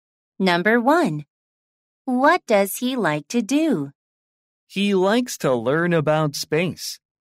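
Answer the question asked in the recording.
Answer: learn about space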